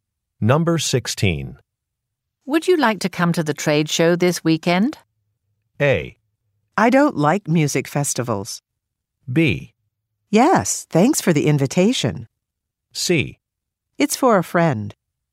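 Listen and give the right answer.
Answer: B: Yes, thanks for the invitation.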